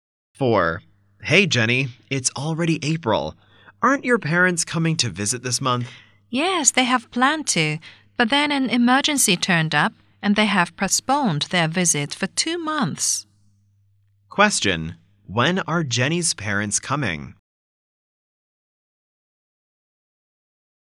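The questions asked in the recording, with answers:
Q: Question, when are Jenny's parents coming?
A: In June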